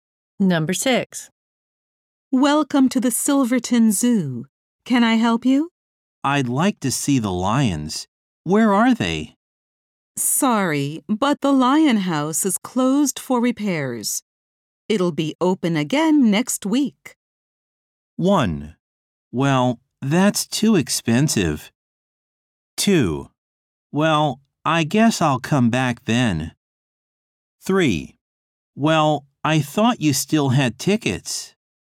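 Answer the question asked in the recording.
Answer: 2: Well, I guess I'll come back then.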